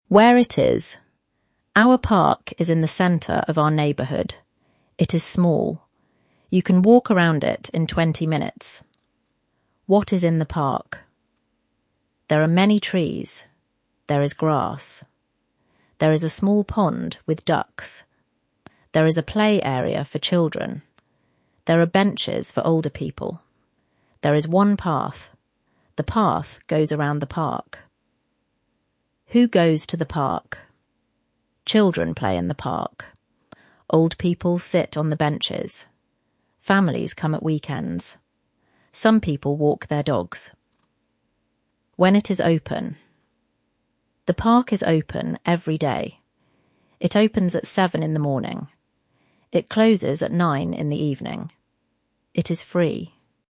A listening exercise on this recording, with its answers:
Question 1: How long does it take to walk around the park?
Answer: About twenty minutes.

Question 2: What is in the pond?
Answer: Ducks.

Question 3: Where do older people sit?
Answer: On the benches.

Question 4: When does the park open and close?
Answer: It opens at 7 in the morning and closes at 9 in the evening.

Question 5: Do you have to pay to go to the park?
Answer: No, it is free.

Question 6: Who comes to the park at weekends?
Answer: Families.

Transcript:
WHERE IT IS
Our park is in the centre of our neighbourhood. It is small. You can walk around it in twenty minutes.
WHAT IS IN THE PARK
There are many trees. There is grass. There is a small pond with ducks.
There is a play area for children. There are benches for older people.
There is one path. The path goes around the park.
WHO GOES TO THE PARK
Children play in the park. Old people sit on the benches. Families come at weekends. Some people walk their dogs.
WHEN IT IS OPEN
The park is open every day. It opens at 7 in the morning. It closes at 9 in the evening.
It is free.